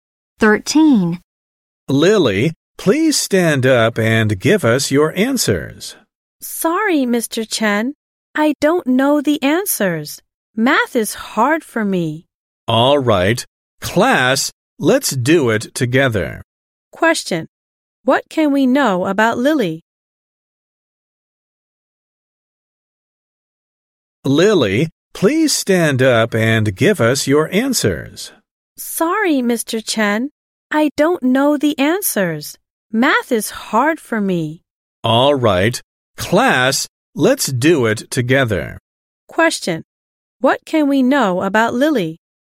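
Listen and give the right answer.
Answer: Math is hard for her; she doesn't know the answers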